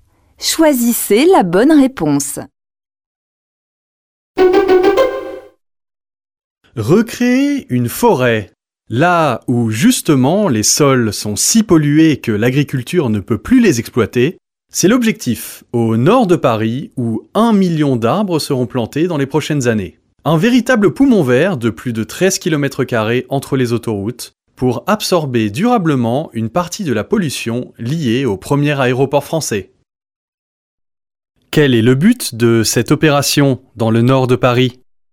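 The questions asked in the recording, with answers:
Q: Quel est le but de cette opération dans le nord de Paris ?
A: Recréer une forêt sur des sols pollués pour absorber une partie de la pollution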